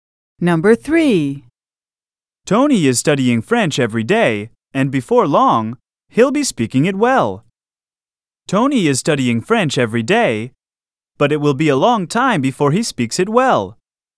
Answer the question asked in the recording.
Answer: Different is the correct answer.